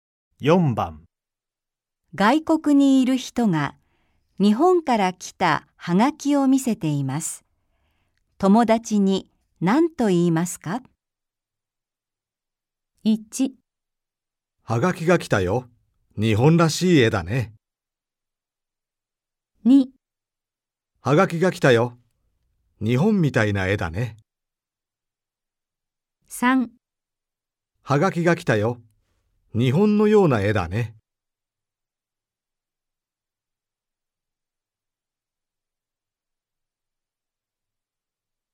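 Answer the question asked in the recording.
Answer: 1: はがきが来たよ。日本らしい絵だね。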